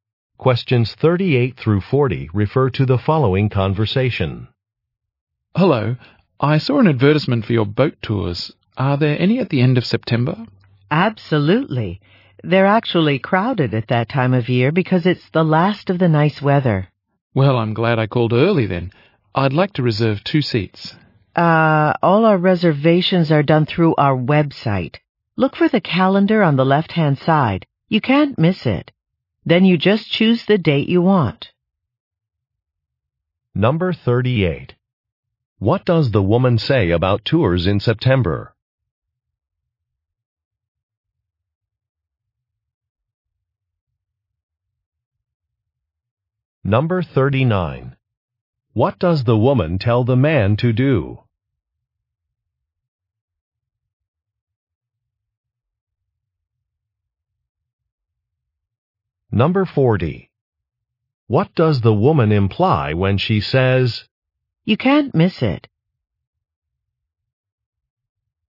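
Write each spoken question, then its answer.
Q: What does the woman say about tours in September?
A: They are crowded

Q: What does the woman tell the man to do?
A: Reserve through the website

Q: What does the woman imply when she says,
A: The calendar is easy to find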